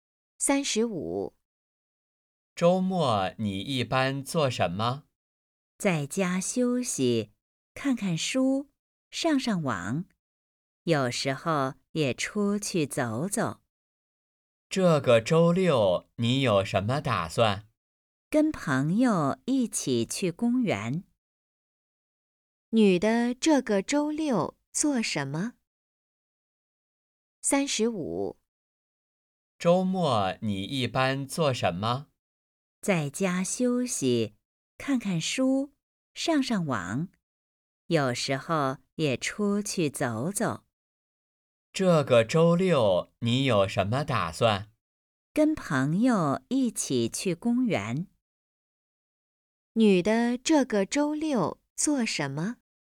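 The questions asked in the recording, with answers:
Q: 女的这个周六做什么?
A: 跟朋友一起去公园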